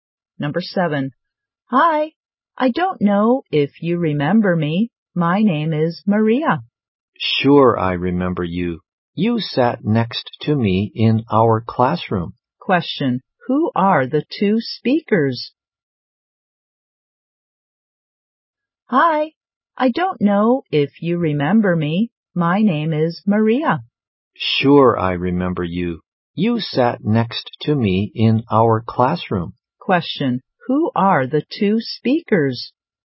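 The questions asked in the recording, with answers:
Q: Question.Who are the two speakers?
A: Classmates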